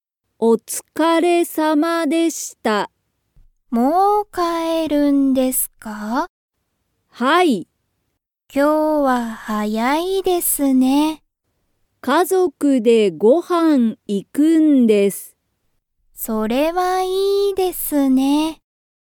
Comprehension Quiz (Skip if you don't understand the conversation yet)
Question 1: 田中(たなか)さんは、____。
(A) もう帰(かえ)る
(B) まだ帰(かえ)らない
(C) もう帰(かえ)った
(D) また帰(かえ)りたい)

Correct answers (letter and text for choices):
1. (A) もう帰(かえ)る

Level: Level 1